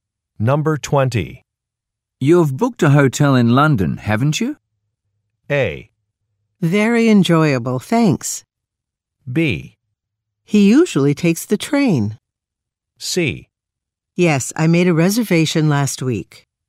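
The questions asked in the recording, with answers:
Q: You've booked a hotel in London, haven't you?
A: C: Yes, I made a reservation last week.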